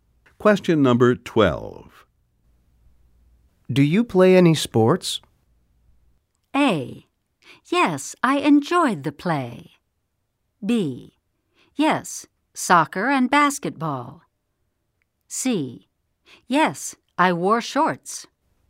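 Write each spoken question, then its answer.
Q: Do you play any sports?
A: B: Yes, soccer and basketball.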